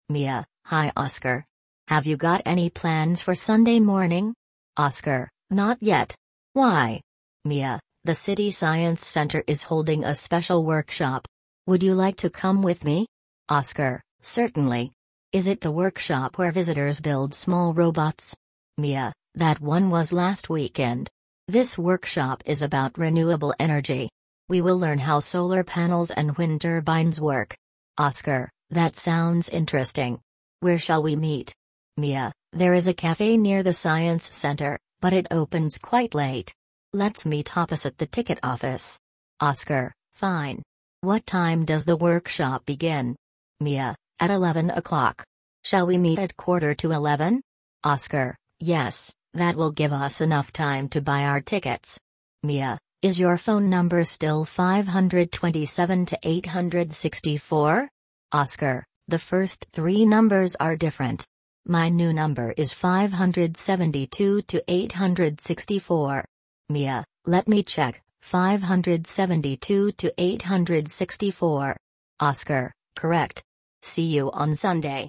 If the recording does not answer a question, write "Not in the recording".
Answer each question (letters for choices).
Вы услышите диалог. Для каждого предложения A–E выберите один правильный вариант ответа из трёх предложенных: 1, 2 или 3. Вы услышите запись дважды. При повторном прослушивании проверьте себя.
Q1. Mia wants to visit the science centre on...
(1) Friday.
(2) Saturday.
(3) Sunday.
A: 3

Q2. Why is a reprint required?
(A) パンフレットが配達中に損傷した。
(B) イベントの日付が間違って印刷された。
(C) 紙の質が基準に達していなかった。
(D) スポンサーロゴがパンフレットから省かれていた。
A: Not in the recording

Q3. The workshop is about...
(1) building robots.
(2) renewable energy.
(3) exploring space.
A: 2

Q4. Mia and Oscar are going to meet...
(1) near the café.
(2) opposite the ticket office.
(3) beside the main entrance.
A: 2

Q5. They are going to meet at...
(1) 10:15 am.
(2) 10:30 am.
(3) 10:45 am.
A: 3

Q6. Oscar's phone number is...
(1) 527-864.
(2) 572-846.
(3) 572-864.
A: 3

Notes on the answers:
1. Миа приглашает Оскара посетить научный центр в воскресенье утром: Have you got any plans for Sunday morning?
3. Мастер-класс посвящён возобновляемой энергии, солнечным панелям и ветряным турбинам.
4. Миа предлагает встретиться напротив билетной кассы.
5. Они договорились встретиться без четверти одиннадцать, то есть в 10:45.
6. Новый номер телефона Оскара — 572-864.

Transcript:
Mia: Hi Oscar. Have you got any plans for Sunday morning?
Oscar: Not yet. Why?
Mia: The city science centre is holding a special workshop. Would you like to come with me?
Oscar: Certainly. Is it the workshop where visitors build small robots?
Mia: That one was last weekend. This workshop is about renewable energy. We will learn how solar panels and wind turbines work.
Oscar: That sounds interesting. Where shall we meet?
Mia: There is a café near the science centre, but it opens quite late. Let's meet opposite the ticket office.
Oscar: Fine. What time does the workshop begin?
Mia: At eleven o'clock. Shall we meet at quarter to eleven?
Oscar: Yes, that will give us enough time to buy our tickets.
Mia: Is your phone number still 527-864?
Oscar: The first three numbers are different. My new number is 572-864.
Mia: Let me check: 572-864.
Oscar: Correct. See you on Sunday!

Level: 7 класса